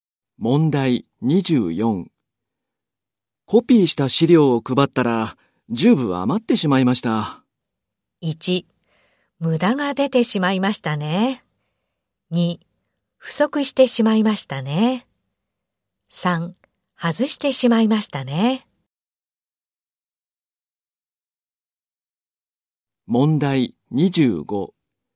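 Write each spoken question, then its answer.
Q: コピーした資料を配ったら、十分余ってしまいました。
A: 1: 無駄が出てしまいましたね。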